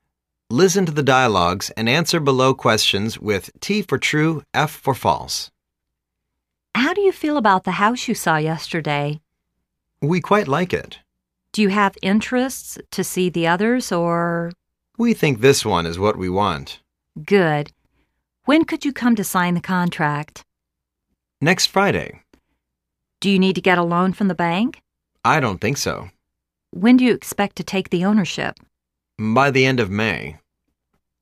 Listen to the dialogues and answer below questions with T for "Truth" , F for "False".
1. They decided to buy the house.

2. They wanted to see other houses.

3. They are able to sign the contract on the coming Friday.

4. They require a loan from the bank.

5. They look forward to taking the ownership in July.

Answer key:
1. T
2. F
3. T
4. F
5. F